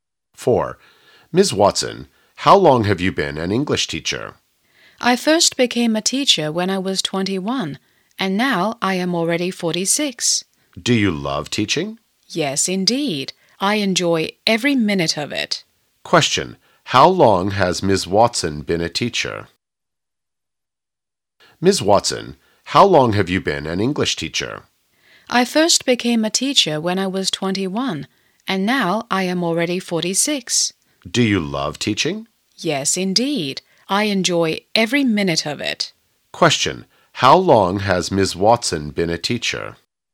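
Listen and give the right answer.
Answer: 25 years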